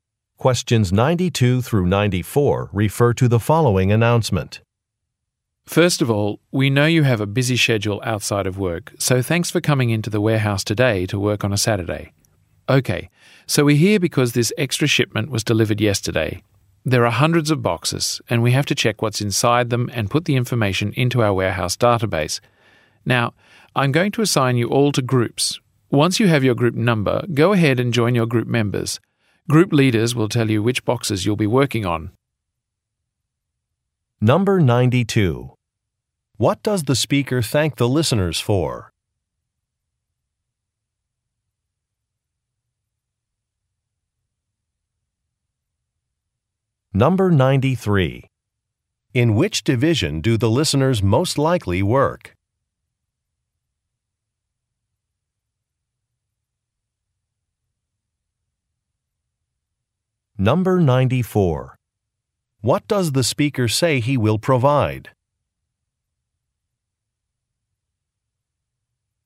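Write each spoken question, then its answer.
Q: What does the speaker thank the listeners for?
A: Coming to work on a Saturday

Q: In which division do the listeners most likely work?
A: The warehouse

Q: What does the speaker say he will provide?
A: Group assignments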